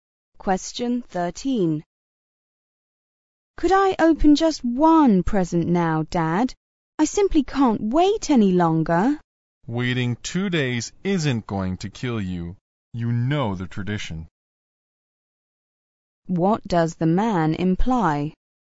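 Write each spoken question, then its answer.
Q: What does the man imply?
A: The child must wait two more days to open presents.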